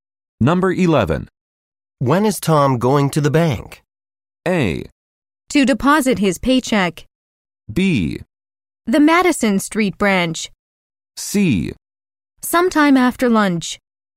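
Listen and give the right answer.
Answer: C: Sometime after lunch.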